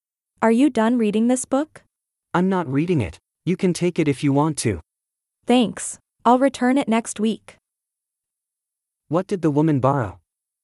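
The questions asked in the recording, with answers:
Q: What did the woman borrow?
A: A book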